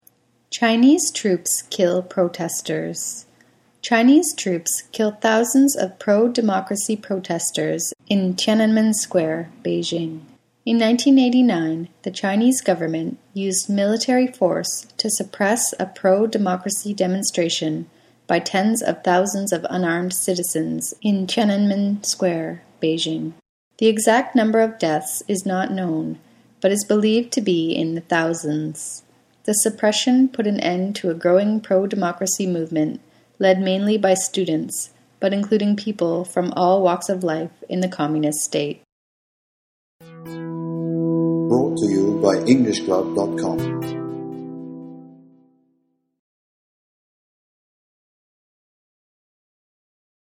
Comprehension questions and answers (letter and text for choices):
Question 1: The protesters at Tiananmen Square were trying to bring about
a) a stronger communist government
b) a more democratic political system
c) higher salaries and lower prices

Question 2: The government brought the demonstrations to an end with the use of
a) military force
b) democratic debate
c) communist ideals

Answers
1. b) a more democratic political system
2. a) military force

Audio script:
Chinese Troops Kill Protesters
Chinese troops kill thousands of pro-democracy protesters in Tiananmen Square, Beijing.
In 1989, the Chinese government used military force to suppress a pro-democracy demonstration by tens of thousands of unarmed citizens in Tiananmen Square, Beijing. The exact number of deaths is not known, but is believed to be in the thousands. The suppression put an end to a growing pro-democracy movement led mainly by students but including people from all walks of life in the communist state.